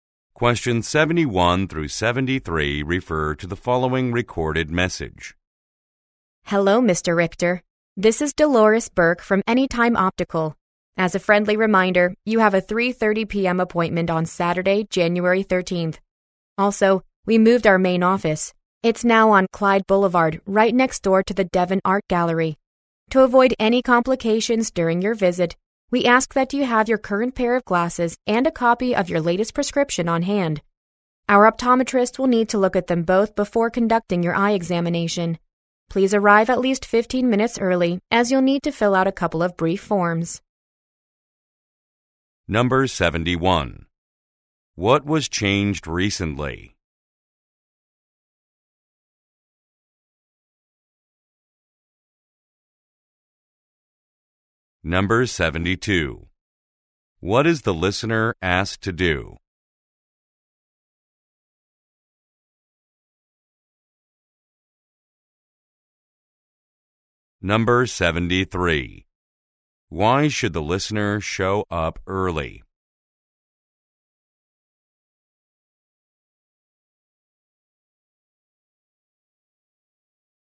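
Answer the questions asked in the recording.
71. The location of the main office
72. Bring current glasses and a copy of the latest prescription
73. To fill out some brief forms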